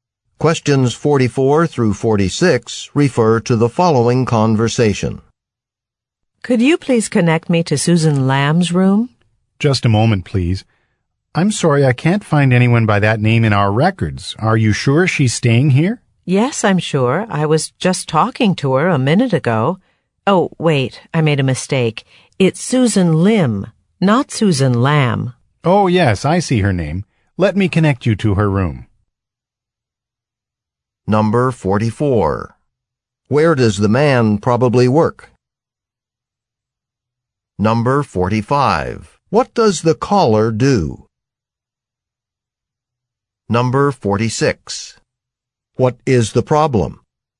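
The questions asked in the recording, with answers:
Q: Where does the man probably work?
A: At a hotel

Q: What is the problem?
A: The guest's name was wrong (Susan Lim, not Susan Lamb)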